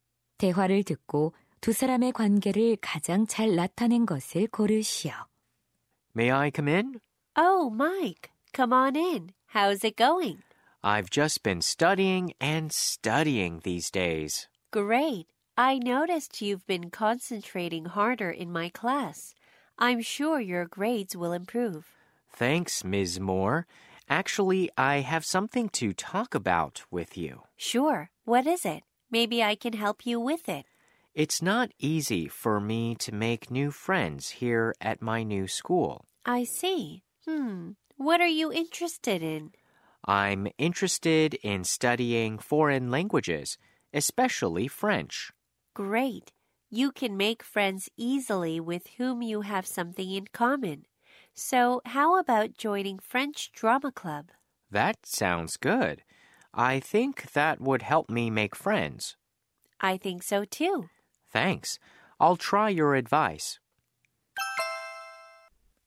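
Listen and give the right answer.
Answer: 교사와 학생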